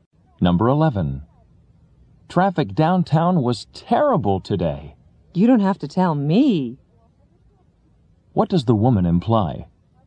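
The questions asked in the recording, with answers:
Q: What does the woman imply?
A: She already knows traffic was terrible.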